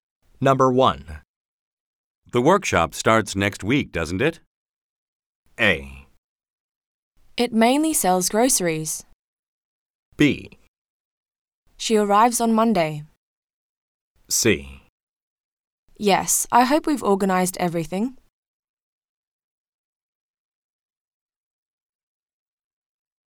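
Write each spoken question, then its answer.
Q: The workshop starts next week, doesn't it?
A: C: Yes, I hope we've organized everything.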